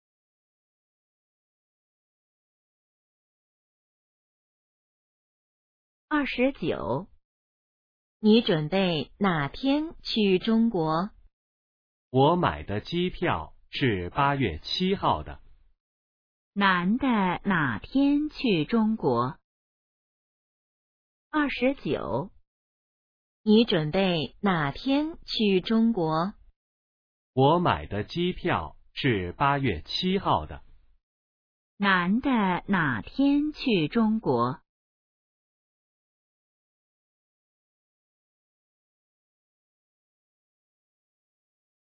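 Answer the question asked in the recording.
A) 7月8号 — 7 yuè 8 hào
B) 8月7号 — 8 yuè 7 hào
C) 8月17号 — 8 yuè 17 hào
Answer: B) 8月7号 — 8 yuè 7 hào

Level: HSK2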